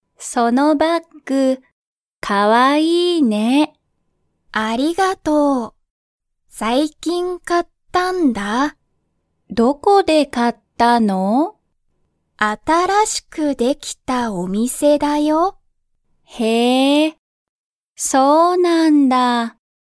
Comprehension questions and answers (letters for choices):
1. ナナは、____そのバッグを買(か)った。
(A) すぐそこ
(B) 今日(きょう)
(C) 最近(さいきん)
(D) 一緒(いっしょ)に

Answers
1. C

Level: Level 1